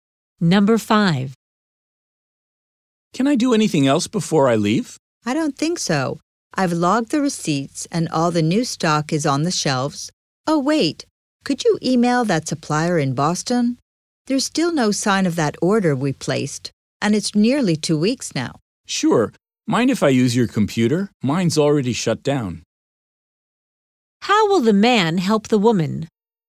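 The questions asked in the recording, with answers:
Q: How will the man help the woman?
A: By emailing the Boston supplier about a late order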